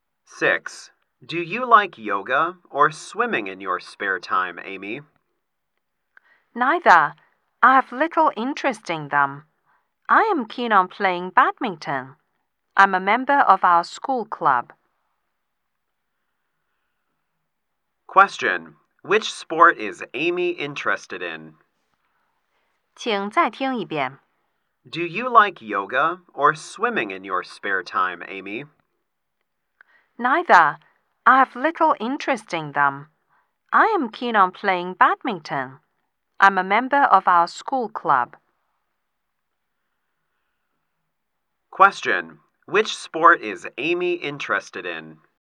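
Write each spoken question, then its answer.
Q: Which sport is Amy interested in?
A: Badminton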